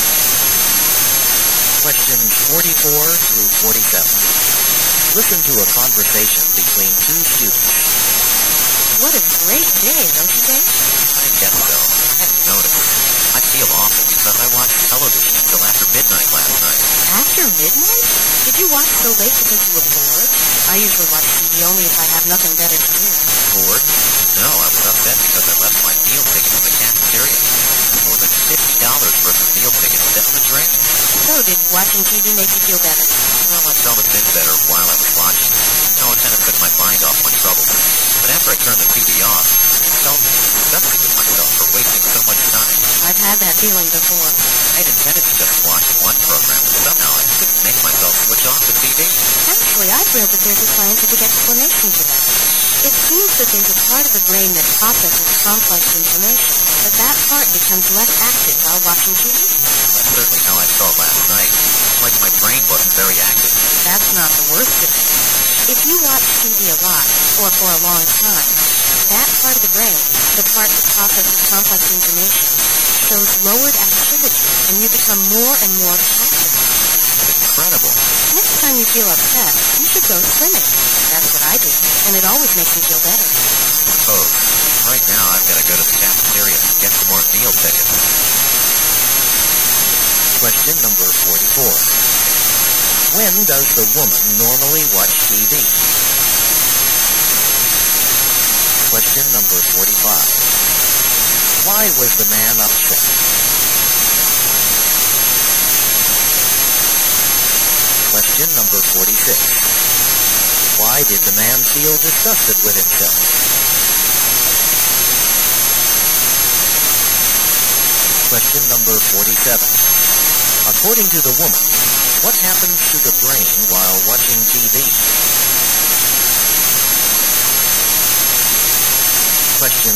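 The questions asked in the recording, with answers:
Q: When does the woman normally watch TV?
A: Only when she has nothing better to do

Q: Why was the man upset?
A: He lost his meal tickets

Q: Why did the man feel disgusted with himself?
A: He wasted so much time watching TV

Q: According to the woman, what happens to the brain while watching TV?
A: The part that processes complex information becomes less active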